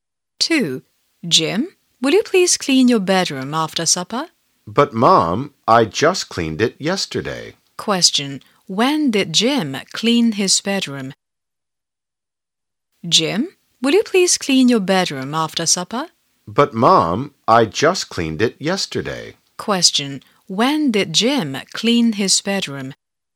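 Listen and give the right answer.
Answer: Yesterday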